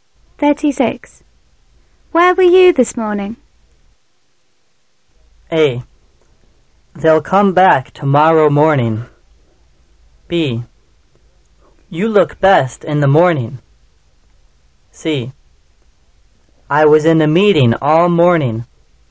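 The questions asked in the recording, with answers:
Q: Where were you this morning?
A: C: I was in a meeting all morning.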